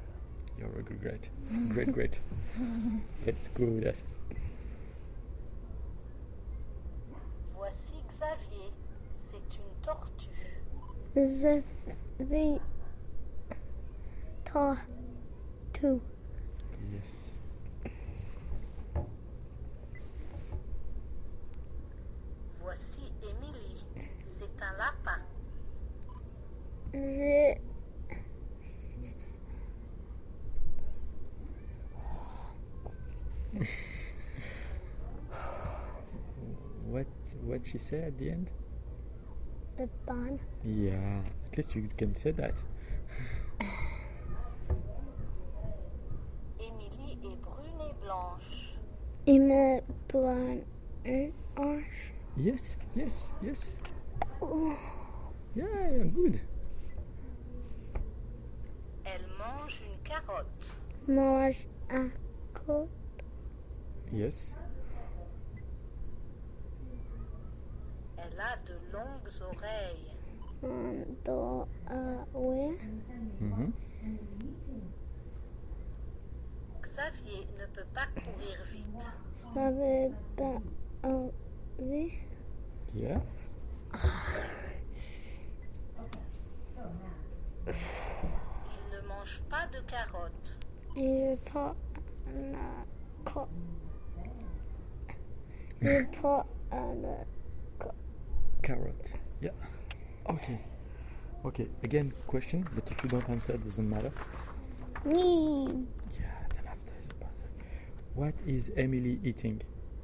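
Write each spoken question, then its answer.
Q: What is Emily eating?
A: A carrot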